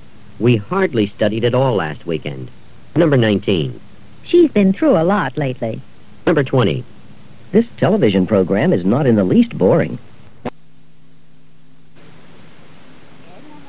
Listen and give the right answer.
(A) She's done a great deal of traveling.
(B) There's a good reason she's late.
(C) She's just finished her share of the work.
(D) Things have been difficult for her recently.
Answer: (D) Things have been difficult for her recently.

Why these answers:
She's been through a lot lately.

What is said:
18. We hardly studied at all last weekend.
19. She's been through a lot lately.